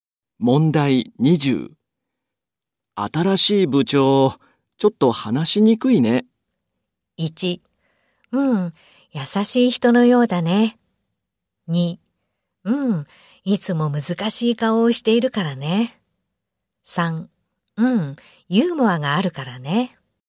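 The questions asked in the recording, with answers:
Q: 新しい部長、ちょっと話しにくいね。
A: 2: うん、いつも難しい顔をしているからね。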